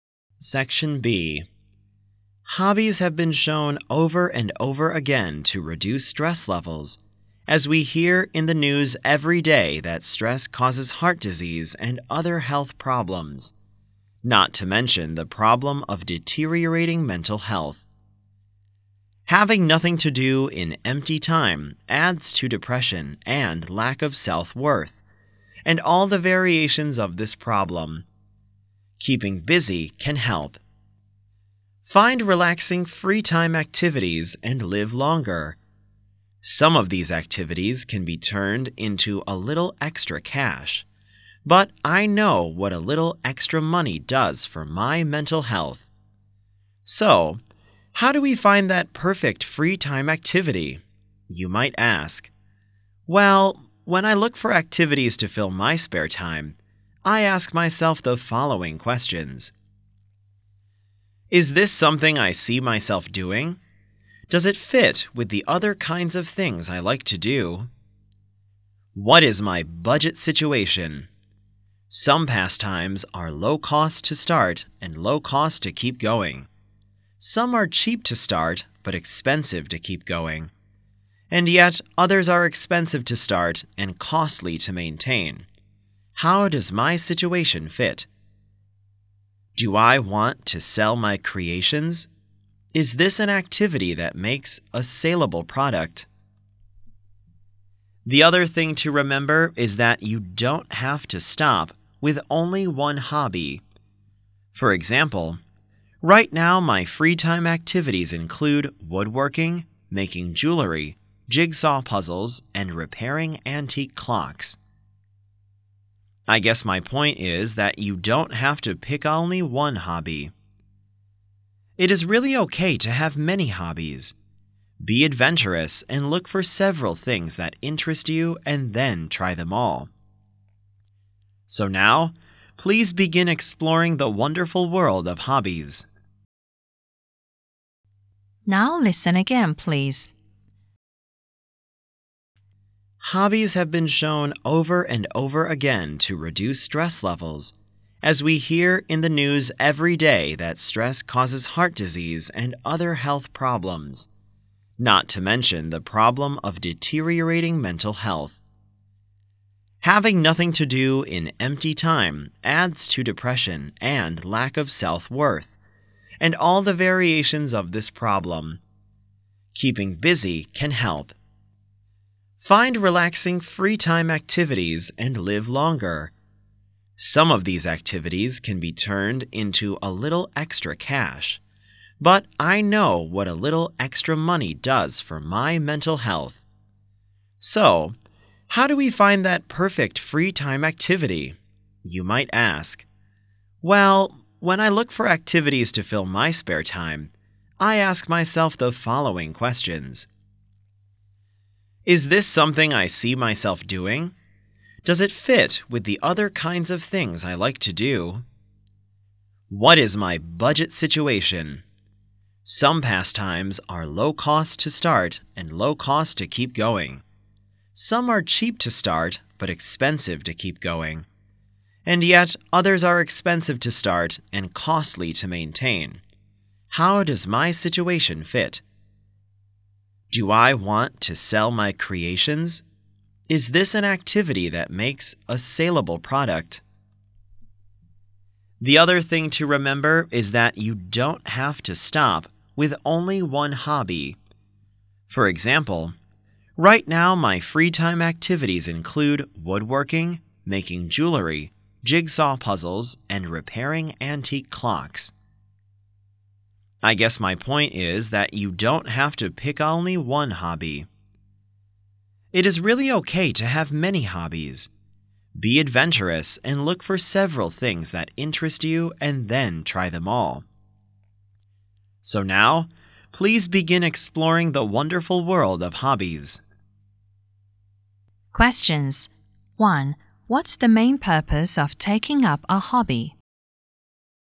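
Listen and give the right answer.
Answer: To reduce stress and stay healthy by keeping busy in free time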